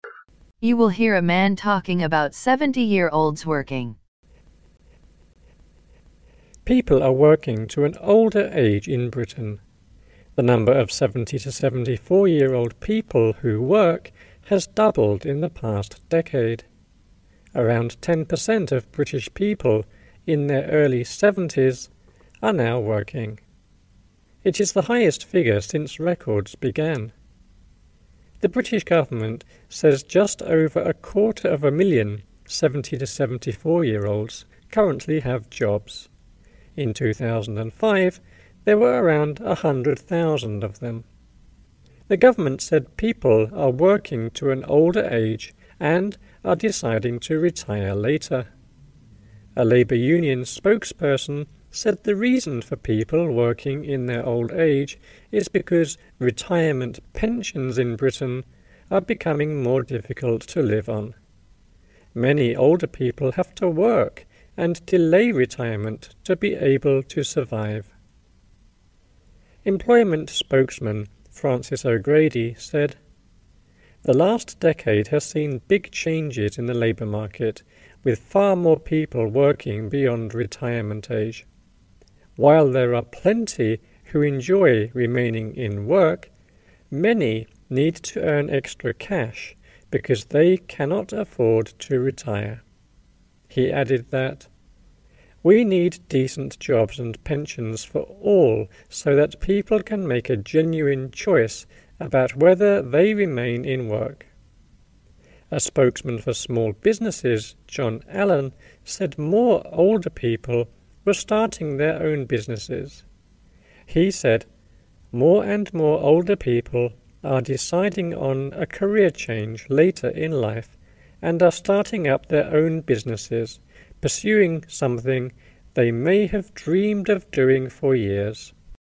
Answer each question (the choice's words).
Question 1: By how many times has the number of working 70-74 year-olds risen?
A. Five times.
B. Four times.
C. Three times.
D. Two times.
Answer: Two times.

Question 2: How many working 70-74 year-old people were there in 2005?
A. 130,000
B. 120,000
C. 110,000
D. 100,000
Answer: 100,000

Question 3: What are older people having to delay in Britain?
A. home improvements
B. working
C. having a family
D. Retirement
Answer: Retirement

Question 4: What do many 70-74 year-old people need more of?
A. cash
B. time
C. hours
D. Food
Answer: cash

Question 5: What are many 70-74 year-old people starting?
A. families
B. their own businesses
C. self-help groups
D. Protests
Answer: their own businesses

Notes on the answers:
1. The number of 70 to 74-year-old people who work has doubled in the past decade. (Số lượng người từ 70 đến 74 tuổi đang làm việc đã tăng gấp đôi trong thập kỷ qua.)
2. In 2005, there were around 100,000 of them. (Năm 2005, có khoảng 100.000 người trong độ tuổi này.)
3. The government said people are working to an older age and are deciding to retire later. (Chính phủ cho biết người dân đang làm việc đến tuổi già và quyết định nghỉ hưu muộn hơn.)
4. (Mặc dù có rất nhiều người thích tiếp tục làm việc, nhưng nhiều người cần kiếm thêm tiền vì họ không đủ khả năng nghỉ hưu.)
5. John Allen, said more older people were starting their own businesses. (John Allen cho biết ngày càng nhiều người lớn tuổi bắt đầu kinh doanh riêng.)

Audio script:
People are working to an older age in Britain. The number of 70 to 74-year-old people who work has doubled in the past decade. Around 10% of British people in their early 70s are now working. It is the highest figure since records began. The British government says just over a quarter of a million 70 to 74-year-olds currently have jobs. In 2005, there were around 100,000 of them. The government said people are working to an older age and are deciding to retire later. A Labour Union spokesperson said the reason for people working in their old age is because retirement pensions in Britain are becoming more difficult to live on. Many older people have to work and delay retirement to be able to survive. Employment spokesman Francis O'Grady said the last decade has seen big changes in the labour market, with far more people working beyond retirement age. While there are plenty who enjoy remaining in work, many need to earn extra cash because they cannot afford to retire. He added that we need decent jobs and pensions for all so that people can make a genuine choice about whether they remain in work. A spokesman for small businesses, John Allen, said more older people were starting their own businesses. He said more and more older people are deciding on a career change later in life and are starting up their own businesses, pursuing something they may have dreamed of doing for years.

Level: Vận dụng